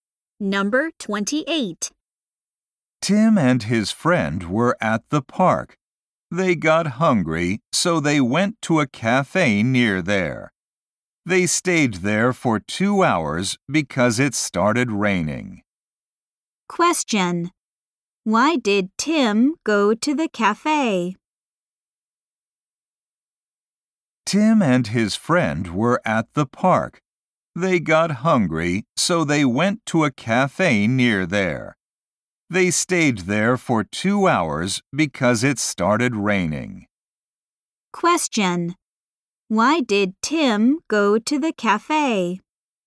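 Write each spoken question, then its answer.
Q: Why did Tim go to the cafe?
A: He got hungry.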